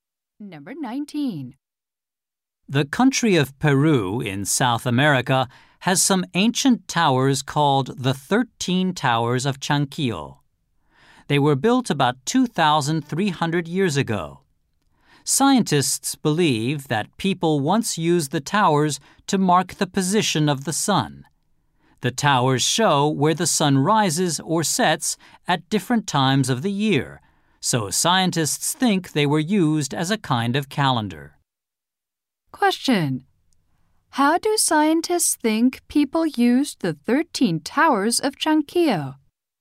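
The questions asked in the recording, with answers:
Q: How do scientists think people used the 13 Towers of Chanquillo?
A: As a kind of calendar, marking the position of the sun.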